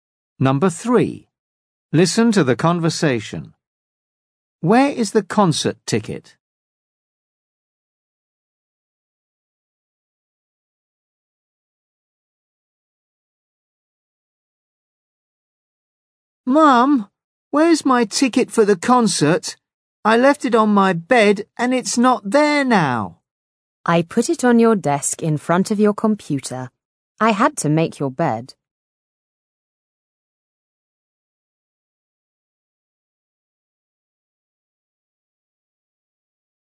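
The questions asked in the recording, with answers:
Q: Where is the concert ticket?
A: On the desk in front of the computer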